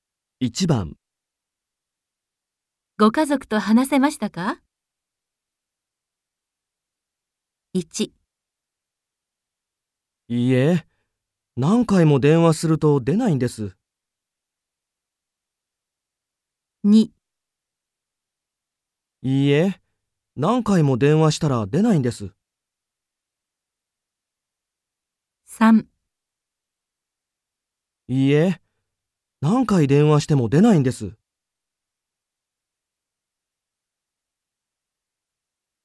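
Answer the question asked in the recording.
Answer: 3: いいえ、何回電話しても出ないんです。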